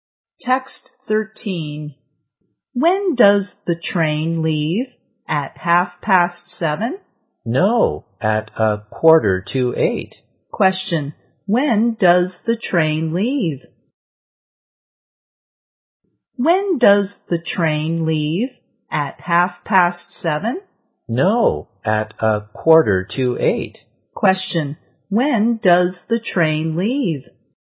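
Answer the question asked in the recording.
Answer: At 7:45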